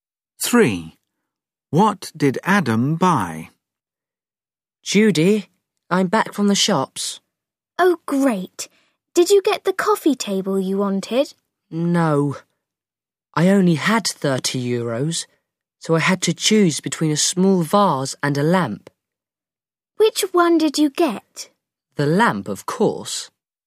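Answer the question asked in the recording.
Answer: a lamp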